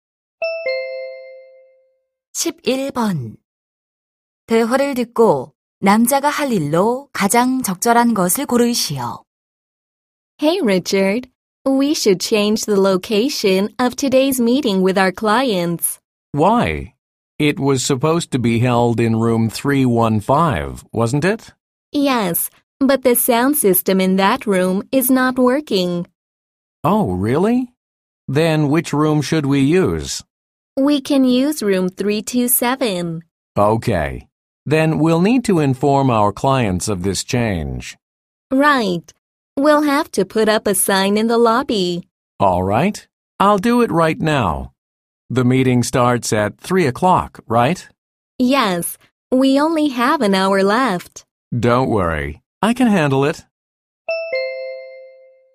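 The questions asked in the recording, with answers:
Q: 대화를 듣고 남자가 할 일로 가장 적절한 것을 고르시오.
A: 고객에게 회의실 변경 알리기(로비에 안내문 붙이기)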